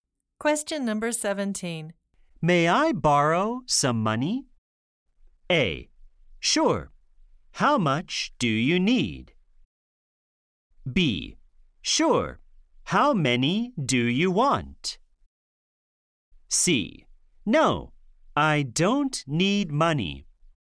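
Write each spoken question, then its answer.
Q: May I borrow some money?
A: A: Sure. How much do you need?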